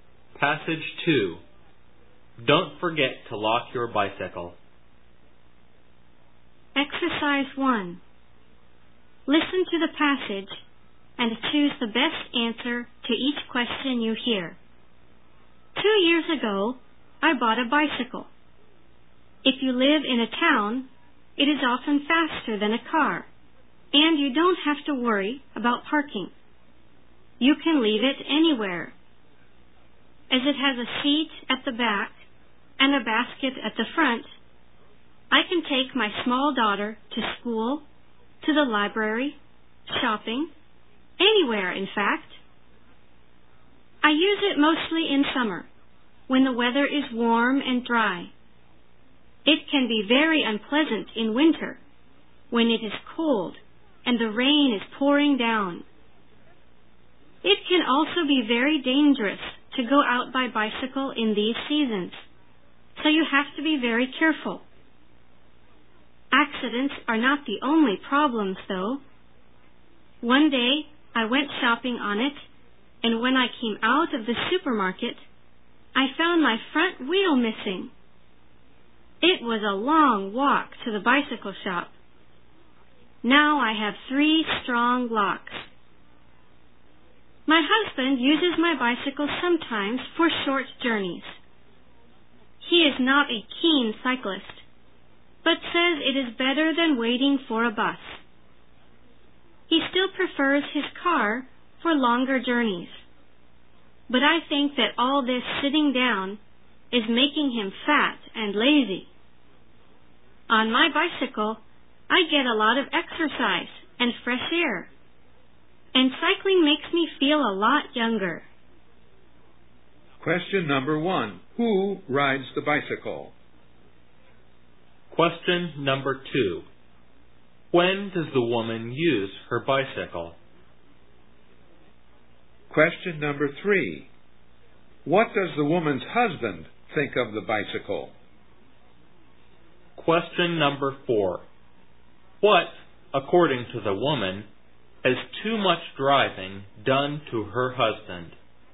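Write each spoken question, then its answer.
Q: Who rides the bicycle?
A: The woman and sometimes her husband

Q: When does the woman use her bicycle?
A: Mostly in summer, when it is warm and dry

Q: What does the woman's husband think of the bicycle?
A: It is better than waiting for a bus

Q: What, according to the woman, has too much driving done to her husband?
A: Made him fat and lazy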